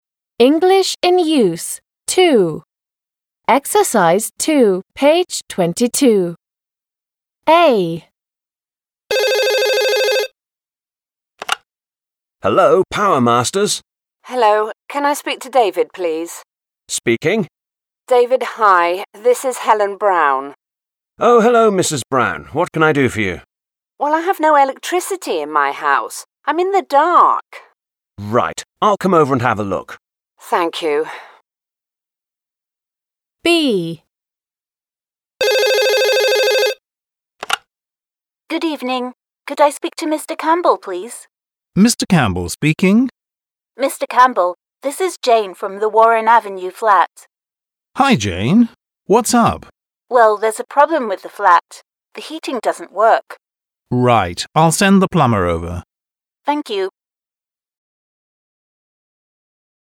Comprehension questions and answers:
2. Listen and read. What problems do Mrs Brown and Jane have?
What problems do Mrs Brown and Jane have?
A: Mrs Brown has no electricity in her house.

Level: 6 класс